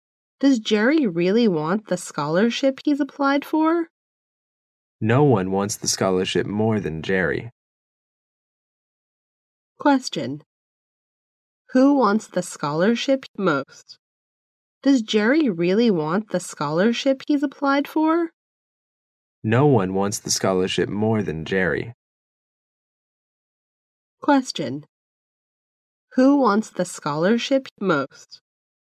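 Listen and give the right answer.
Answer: Jerry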